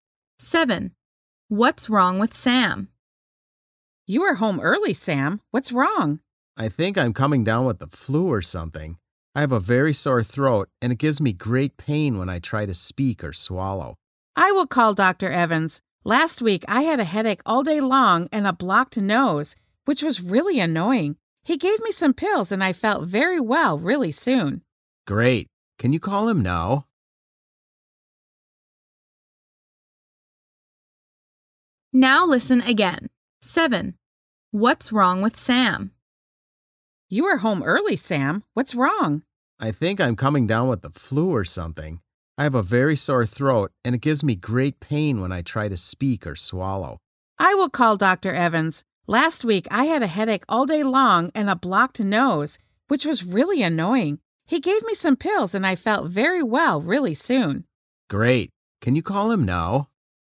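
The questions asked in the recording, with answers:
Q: What's wrong with Sam?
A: He has a sore throat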